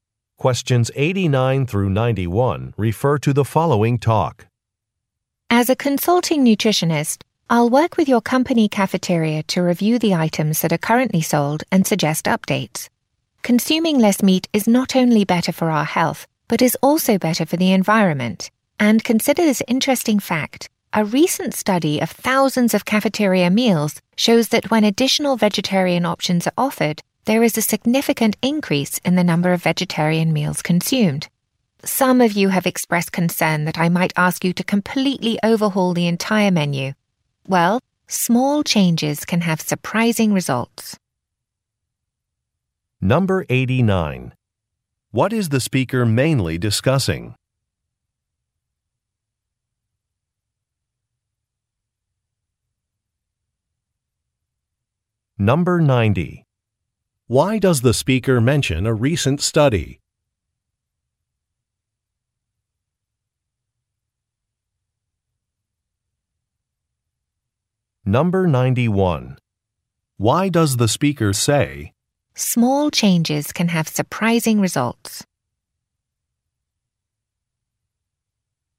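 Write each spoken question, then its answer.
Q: What is the speaker mainly discussing?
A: Updating the cafeteria menu

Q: Why does the speaker mention a recent study?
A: To show that offering more vegetarian options increases vegetarian meals eaten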